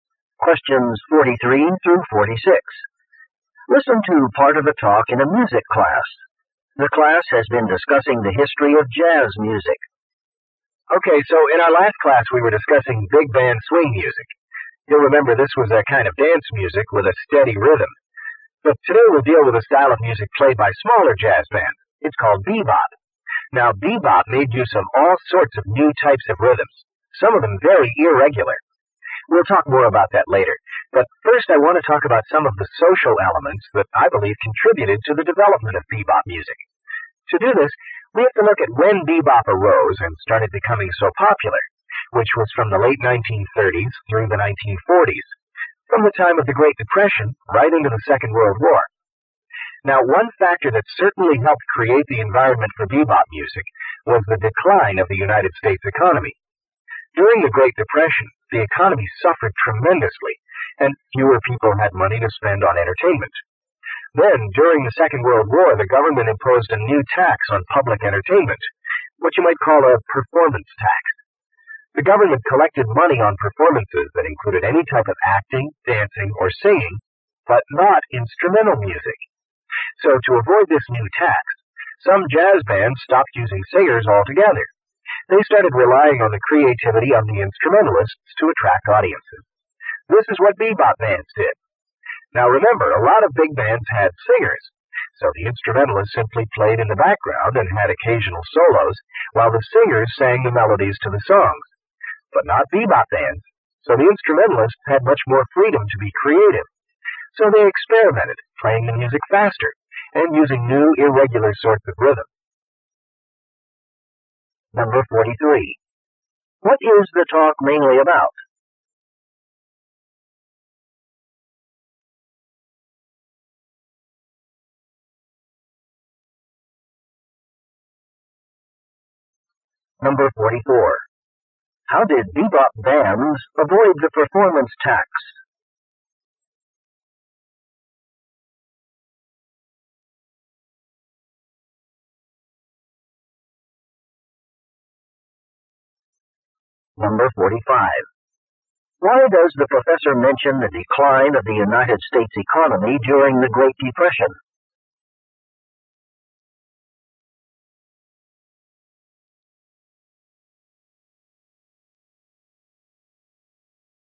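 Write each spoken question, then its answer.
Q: What is the talk mainly about?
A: Social factors behind the development of bebop.

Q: How did bebop bands avoid the performance tax?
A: They stopped using singers.

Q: Why does the professor mention the decline of the United States economy during the Great Depression?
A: It helped create conditions for bebop's development.

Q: What does the professor describe as a significant characteristic of bebop music?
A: New, irregular rhythms.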